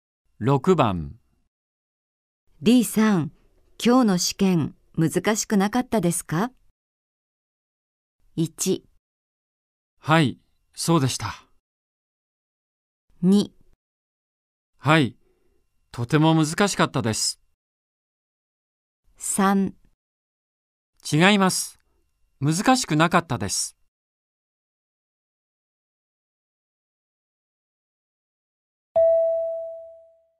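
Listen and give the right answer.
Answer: 2: はい、とても難しかったです。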